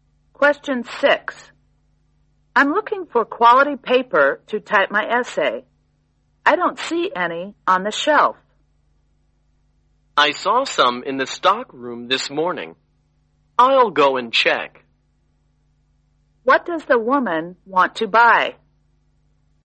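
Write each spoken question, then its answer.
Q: What does the woman want to buy?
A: Quality paper to type her essay.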